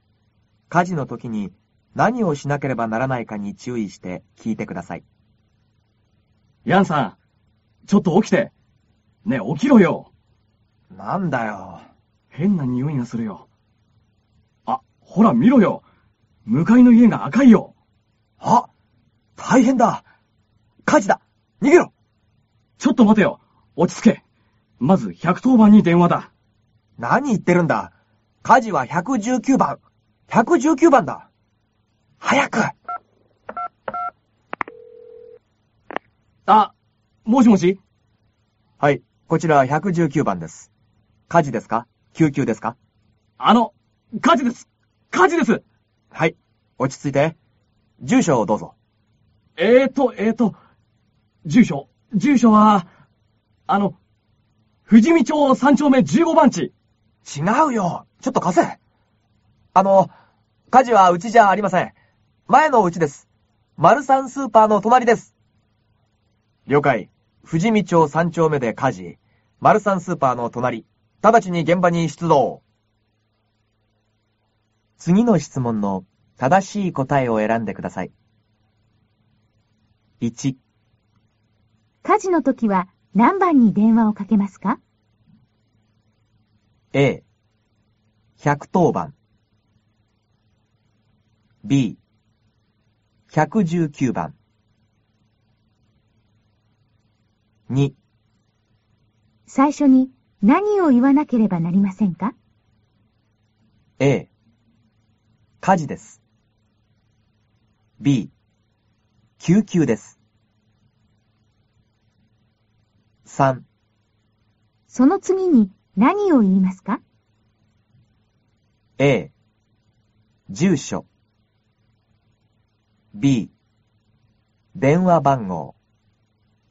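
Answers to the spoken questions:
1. B: 119番
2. A: 火事です
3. A: 住所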